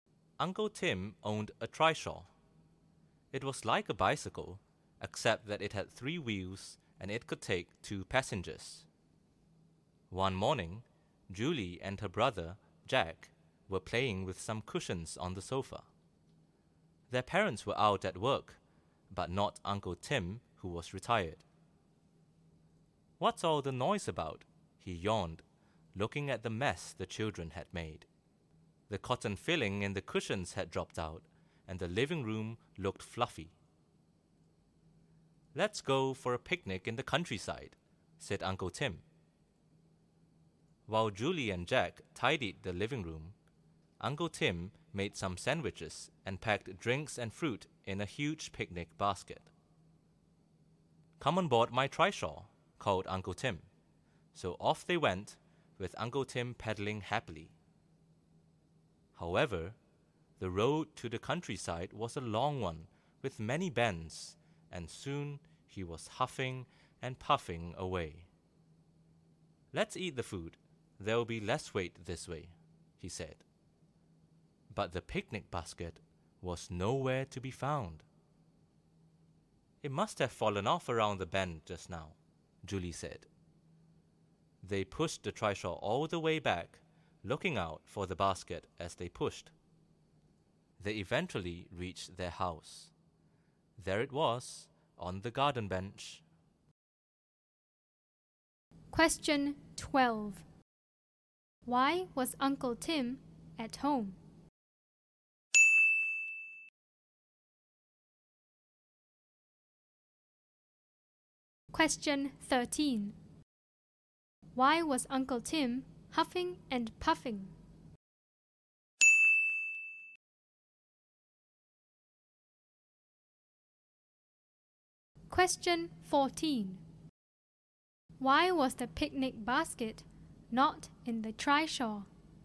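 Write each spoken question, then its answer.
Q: Why was Uncle Tim at home?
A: He was retired.

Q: Why was Uncle Tim huffing and puffing?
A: The road to the countryside was long with many bends, so pedaling was tiring.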